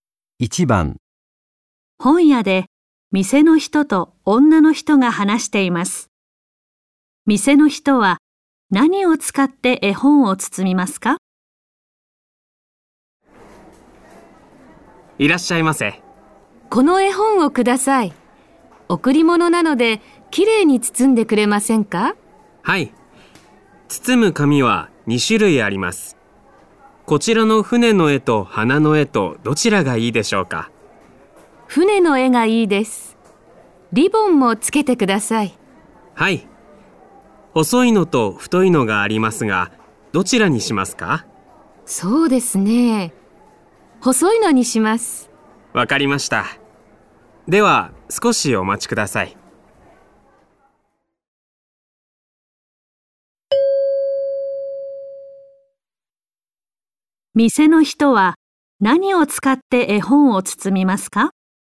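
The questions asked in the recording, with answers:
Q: 店の人は何を使って絵本を包みますか?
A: 船の絵の紙と細いリボン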